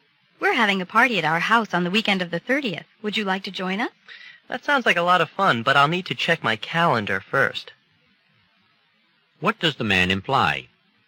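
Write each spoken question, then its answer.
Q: What does the man imply?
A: He isn't sure yet if he's free; he has to check his schedule first.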